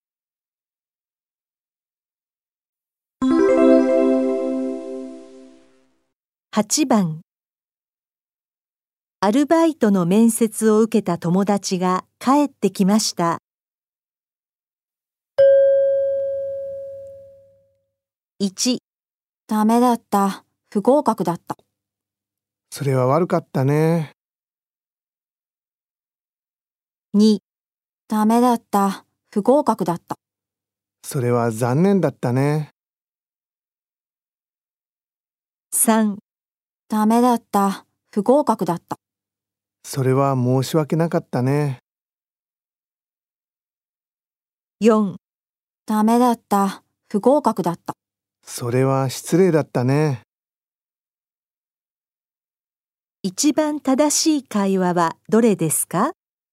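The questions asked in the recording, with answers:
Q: 一番正しい会話はどれですか?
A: 2: それは残念だったね。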